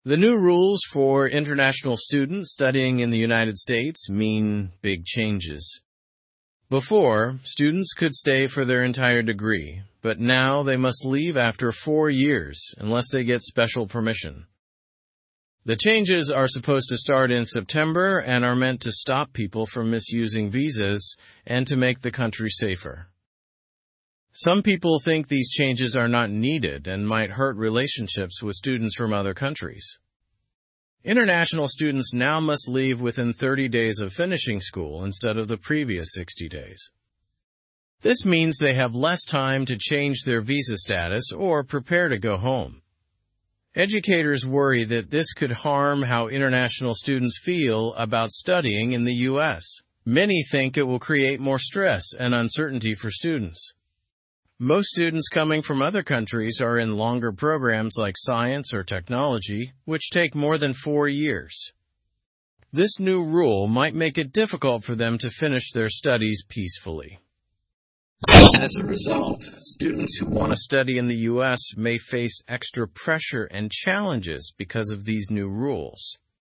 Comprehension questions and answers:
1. What are the new rules for international students?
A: They can only stay for up to four years without special permission.

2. When will the changes take effect?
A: In September.

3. Why are these new rules being introduced?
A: To stop supposed visa misuse and improve national security.

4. How long could students stay after graduation before the changes?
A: 60 days.

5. How long can they now stay after finishing their studies?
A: 30 days.

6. What do educators think about the new rules?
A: They criticize them as unnecessary and harmful.

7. What types of programs are most international students enrolled in?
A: Long-term programs like science and technology.

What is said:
The new rules for international students studying in the United States mean big changes. Before, students could stay for their entire degree, but now they must leave after four years unless they get special permission. The changes are supposed to start in September and are meant to stop people from misusing visas and to make the country safer. Some people think these changes are not needed and might hurt relationships with students from other countries.
International students now must leave within 30 days of finishing school instead of the previous 60 days. This means they have less time to change their visa status or prepare to go home. Educators worry that this could harm how international students feel about studying in the US. Many think it will create more stress and uncertainty for students.
Most students coming from other countries are in longer programs like science or technology, which take more than four years. This new rule might make it difficult for them to finish their studies peacefully. As a result, students who want to study in the US may face extra pressure and challenges because of these new rules.

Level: (Level 2)